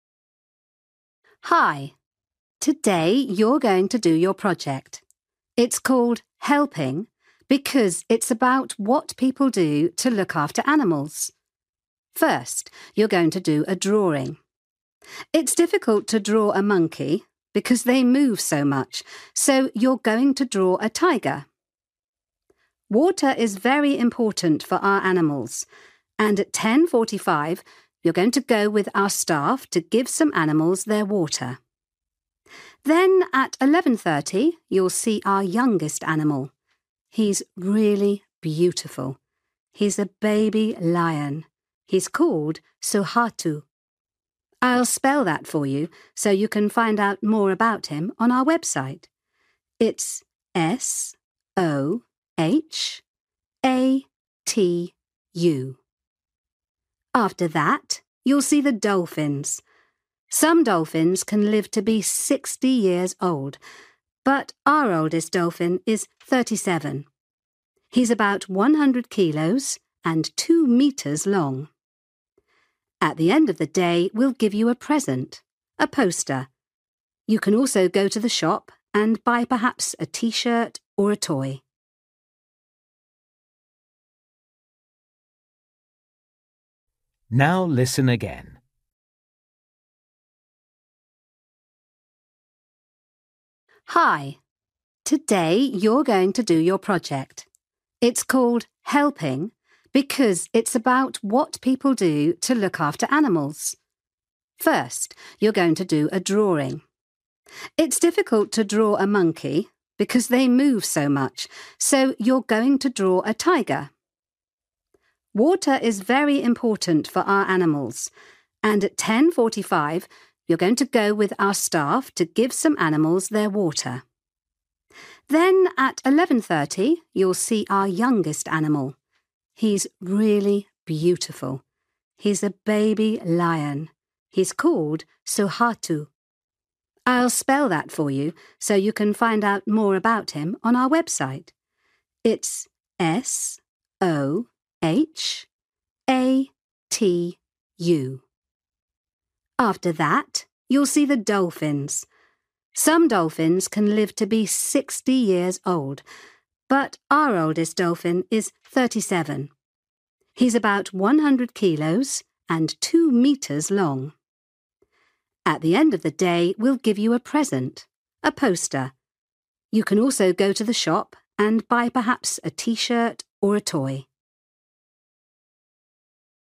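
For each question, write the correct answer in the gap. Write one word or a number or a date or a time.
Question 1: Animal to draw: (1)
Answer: tiger

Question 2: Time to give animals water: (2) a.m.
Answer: 10:45

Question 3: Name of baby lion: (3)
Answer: Sohatu

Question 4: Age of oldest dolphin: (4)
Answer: 37

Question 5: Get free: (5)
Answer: poster

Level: Luyện nghe trình độ A2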